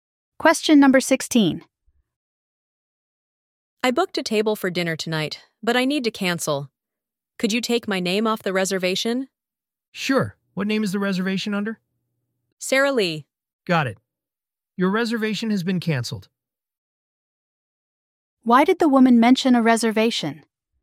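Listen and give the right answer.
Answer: To cancel it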